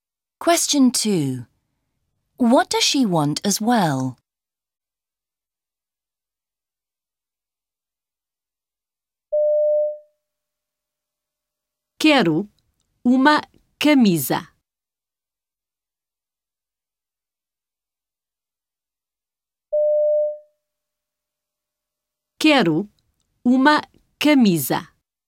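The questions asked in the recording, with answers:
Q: What does she want as well?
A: A shirt (camisa)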